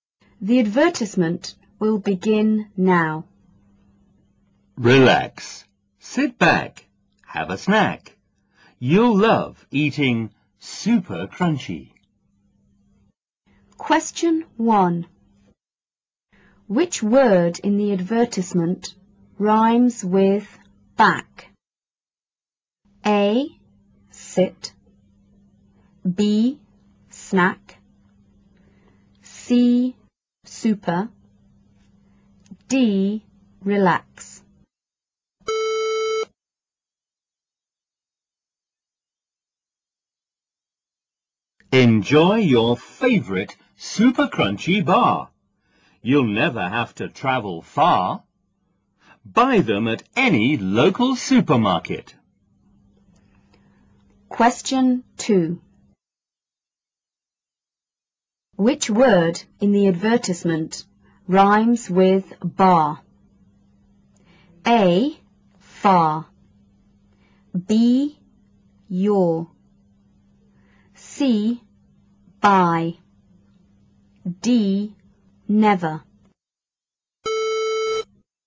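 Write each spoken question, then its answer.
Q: Which word in the advertisement rhymes with back?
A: B: Snack

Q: Which word in the advertisement rhymes with bar?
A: A: Far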